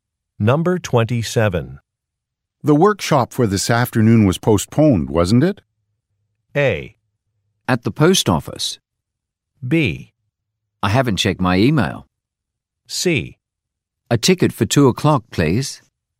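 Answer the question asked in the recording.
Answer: B: I haven't checked my email.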